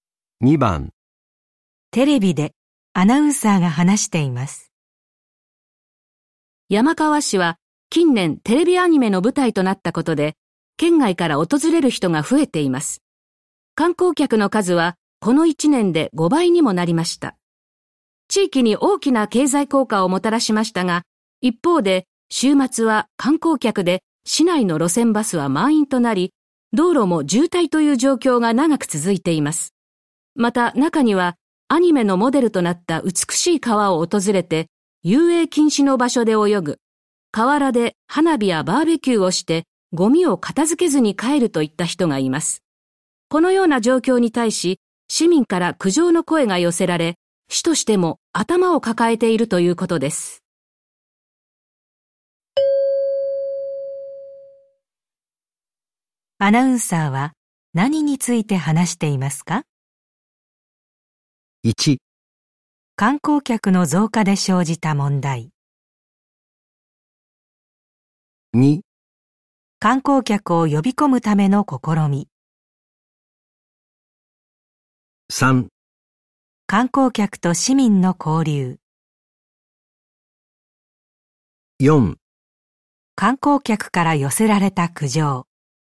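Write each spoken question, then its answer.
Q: アナウンサーは何について話していますか?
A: 1: 観光客の増加で生じた問題。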